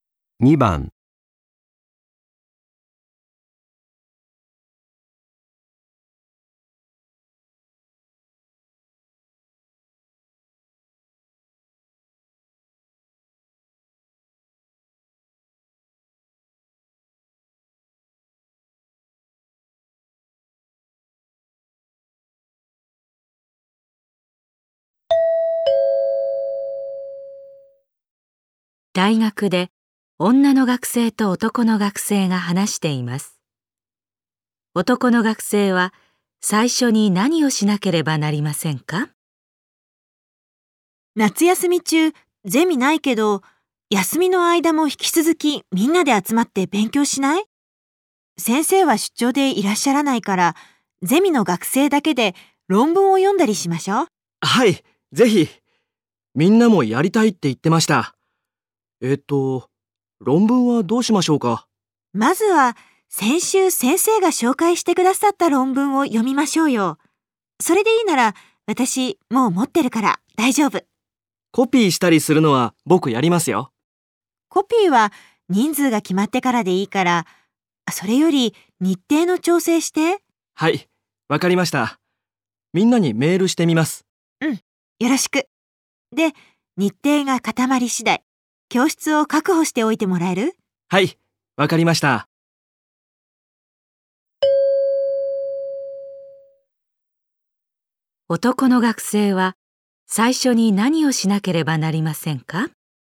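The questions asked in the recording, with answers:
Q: 男の学生は最初に何をしなければなりませんか?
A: みんなにメールして日程を調整する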